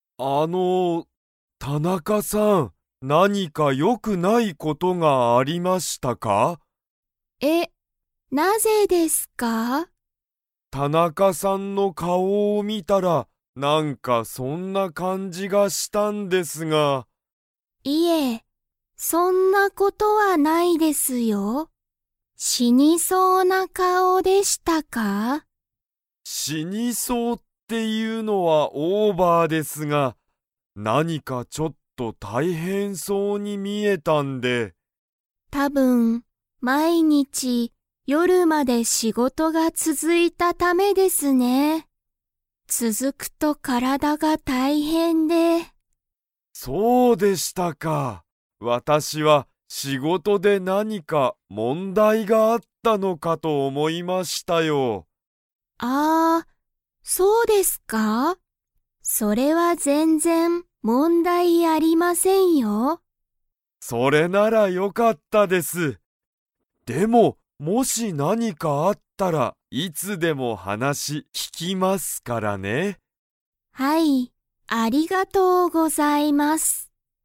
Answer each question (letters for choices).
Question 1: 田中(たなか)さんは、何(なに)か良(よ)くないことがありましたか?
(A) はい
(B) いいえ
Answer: B

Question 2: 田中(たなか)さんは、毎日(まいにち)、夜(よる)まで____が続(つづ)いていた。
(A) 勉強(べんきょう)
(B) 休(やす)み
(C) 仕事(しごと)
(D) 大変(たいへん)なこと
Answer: C

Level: Level 2